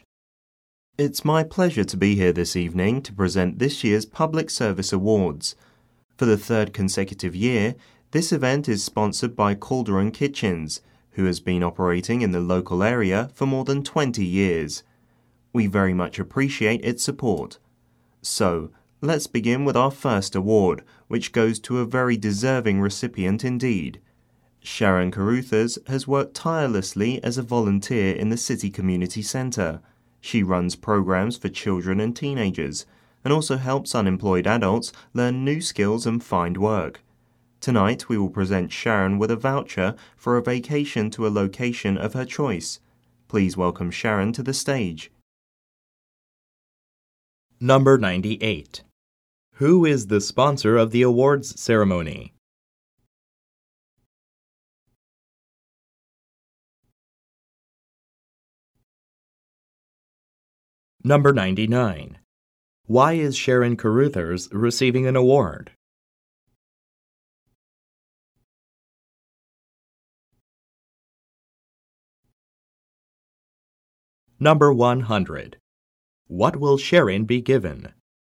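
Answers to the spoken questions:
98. Calderon Kitchens
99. For her volunteer work at the City Community Centre
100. A voucher for a vacation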